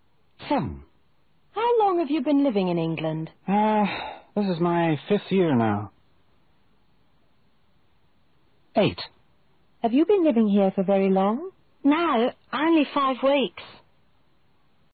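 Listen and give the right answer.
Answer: 5 years (5th year)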